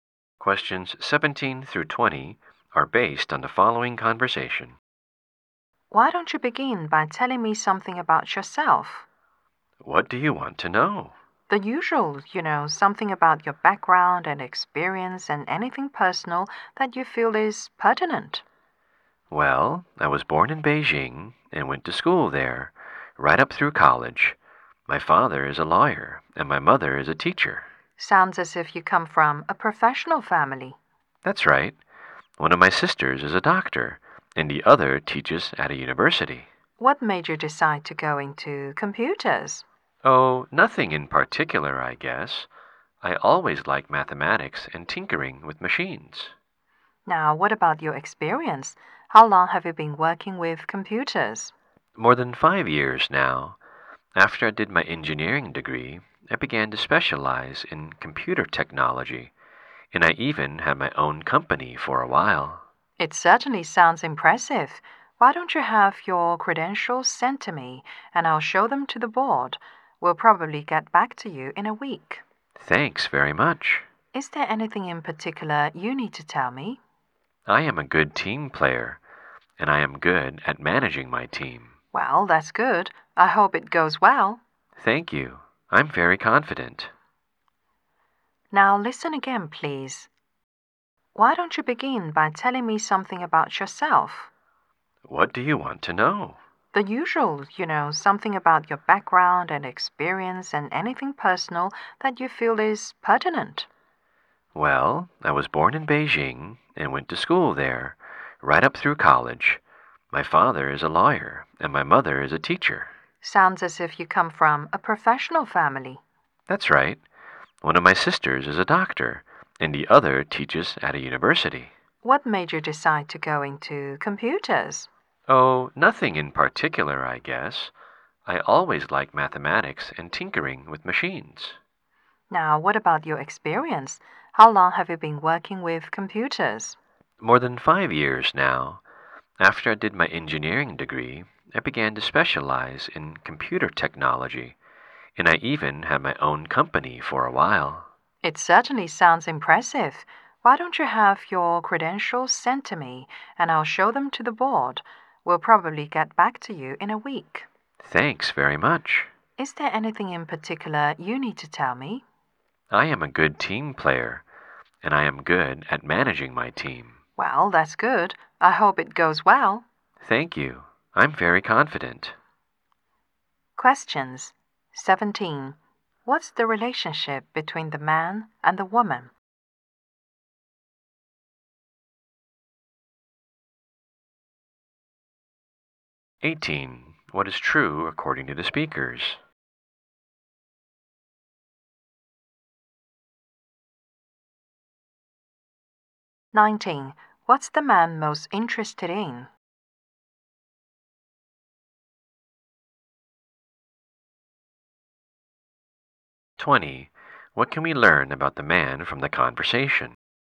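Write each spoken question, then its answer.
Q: What's the relationship between the man and the woman?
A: Interviewer and job applicant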